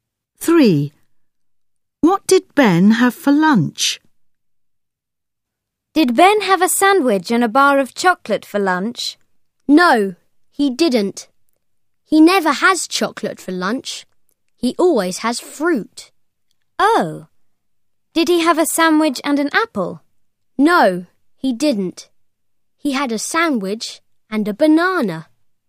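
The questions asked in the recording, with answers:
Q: What did Ben have for lunch?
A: a sandwich and a banana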